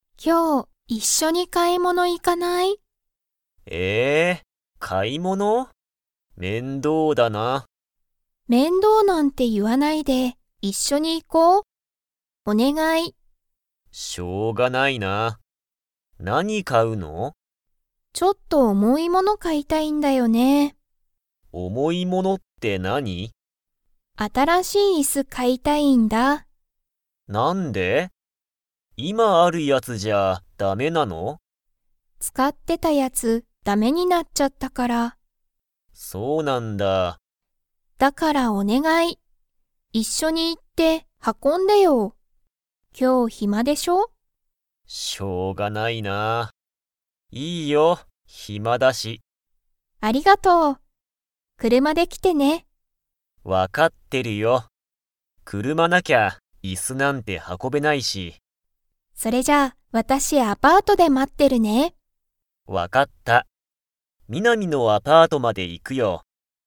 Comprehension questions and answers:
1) ミナミは何なにを買かいたいですか?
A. 車くるま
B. 椅子いす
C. 暇ひま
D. 軽かるいもの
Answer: B. 椅子いす

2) ツバサはミナミのアパートまで車くるまで 。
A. 行いく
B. 行いかない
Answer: A. 行いく

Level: Level 4

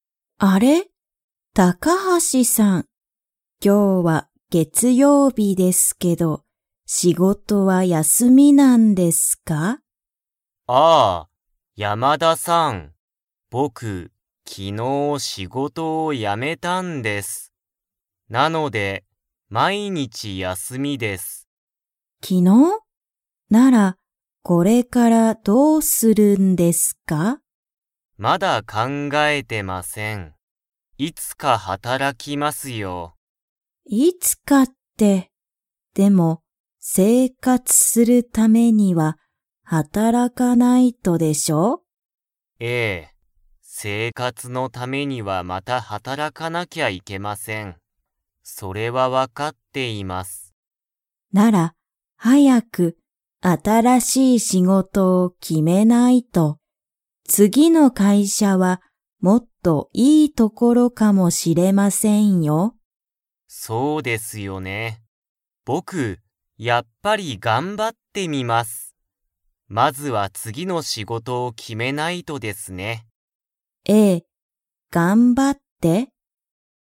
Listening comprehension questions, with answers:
Comprehension Quiz (Skip if you don't understand the conversation yet)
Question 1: 高橋(たかはし)さんは、今(いま)仕事(しごと)をしていますか?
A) はい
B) いいえ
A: B) いいえ

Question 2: ____の会社(かいしゃ)はもっといいところかも知(し)れない。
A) 次(つぎ)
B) 前(まえ)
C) 今日(きょう)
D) 昨日(きのう)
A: A) 次(つぎ)

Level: Level 2

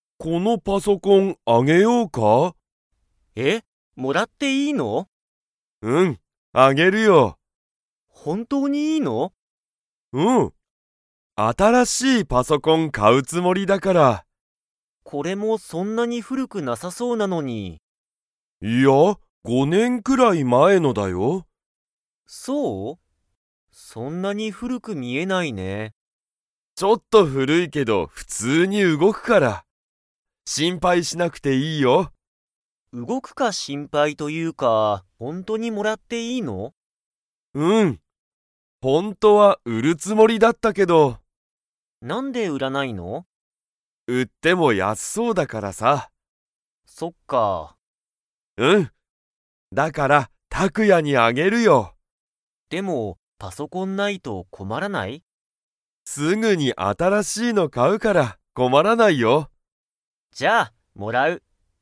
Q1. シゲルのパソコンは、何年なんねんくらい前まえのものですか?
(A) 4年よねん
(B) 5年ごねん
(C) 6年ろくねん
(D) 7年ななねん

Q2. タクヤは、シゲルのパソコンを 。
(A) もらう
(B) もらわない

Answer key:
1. (B) 5年ごねん
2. (A) もらう

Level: Level 3

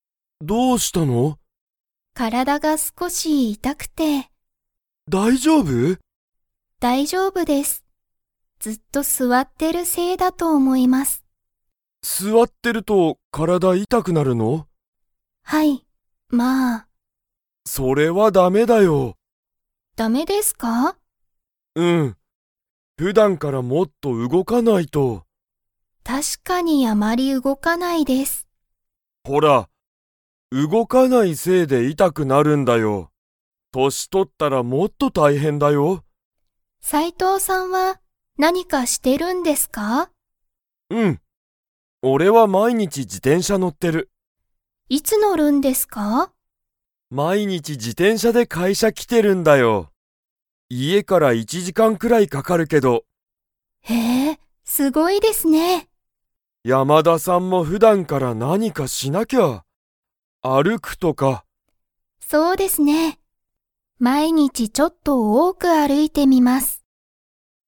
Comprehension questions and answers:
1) 山田(やまだ)さんは、ずっと せいで体(からだ)が痛(いた)い。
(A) 歩(ある)いてる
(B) 動(うご)いてる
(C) 座(すわ)ってる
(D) 年取(としと)ってる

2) 斉藤(さいとう)さんは、毎日(まいにち)1いち時間(じかん)、自転車(じてんしゃ)に乗(の)ってますか?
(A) はい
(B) いいえ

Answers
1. (C) 座(すわ)ってる
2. (A) はい

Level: Level 3

